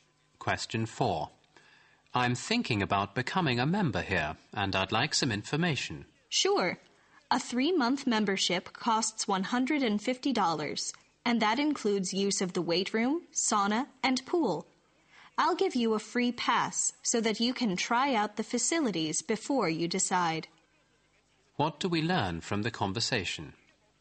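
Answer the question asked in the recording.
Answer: The man can use a free pass to try out the facilities before he decides whether to join.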